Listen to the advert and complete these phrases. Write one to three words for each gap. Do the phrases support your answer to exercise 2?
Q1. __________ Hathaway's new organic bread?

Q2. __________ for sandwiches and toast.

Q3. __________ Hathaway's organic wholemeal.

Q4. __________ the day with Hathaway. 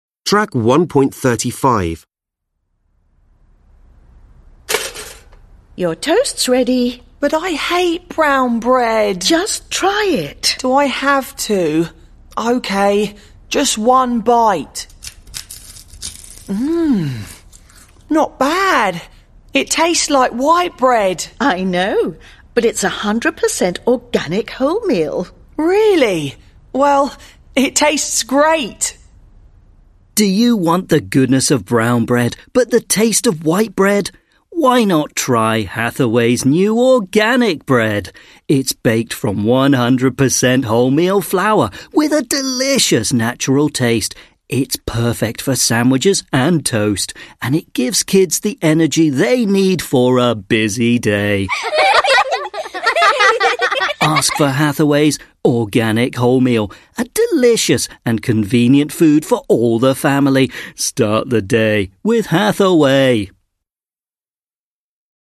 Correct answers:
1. Why not try
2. It's perfect
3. Ask for
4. Start

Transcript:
Mum: Your toast's ready!
Boy: But I hate brown bread!
Mum: Just try it.
Boy: Do I have to? OK, just one bite ... Mmm! Not bad. It tastes
like white bread!
Mum: I know. But it's 100% organic wholemeal.
Boy: Really? Well, it tastes great!
Voice-over Do you want the goodness of brown bread but the taste of white bread? Why not try Hathaway's new organic bread? It's baked from 100% wholemeal flour, with a delicious natural taste. It's perfect for sandwiches and toast. And it gives kids the energy they need for a busy day. Ask for Hathaway's organic wholemeal – a delicious and convenient food for all the family. Start the day with Hathaway!

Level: Lớp 10